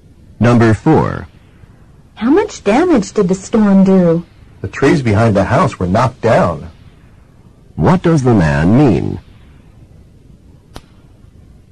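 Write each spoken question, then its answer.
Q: What does the man mean?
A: The storm knocked down the trees behind the house.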